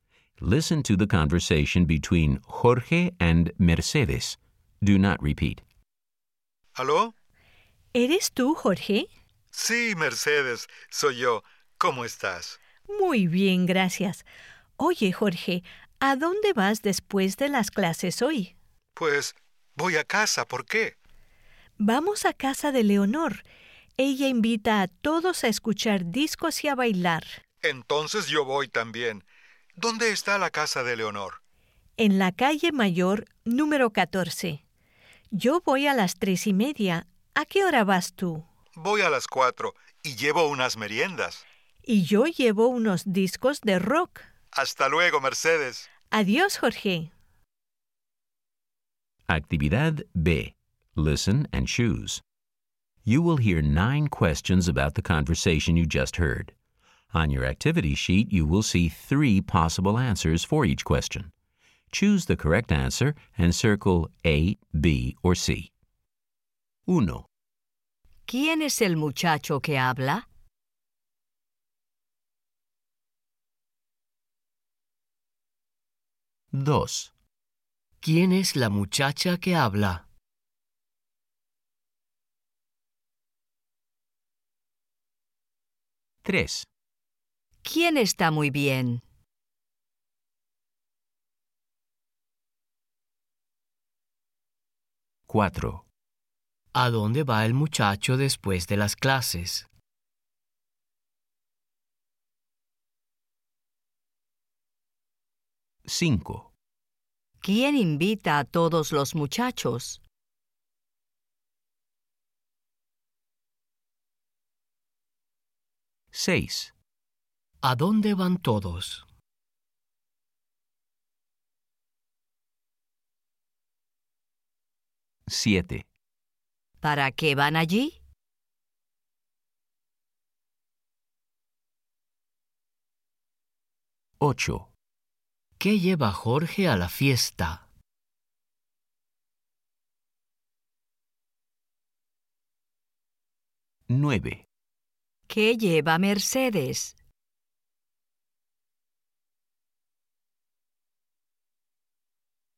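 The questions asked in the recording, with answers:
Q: ¿Quién es el muchacho que habla?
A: Jorge

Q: ¿Quién es la muchacha que habla?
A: Mercedes

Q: ¿Quién está muy bien?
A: Mercedes

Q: ¿Quién invita a todos los muchachos?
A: Leonor

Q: ¿A dónde van todos?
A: A casa de Leonor

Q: ¿Para qué van allí?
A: Para escuchar discos y bailar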